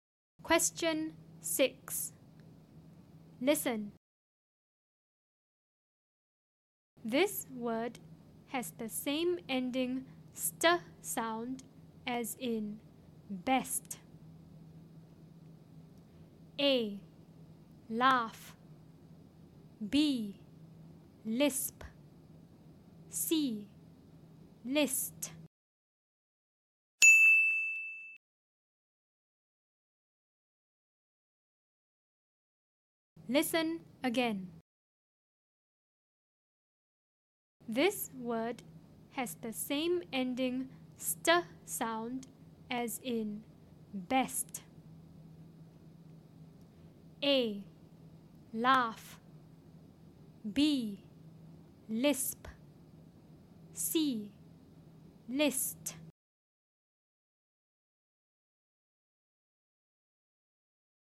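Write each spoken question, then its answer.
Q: This word has the same ending st sound as in best.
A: C: List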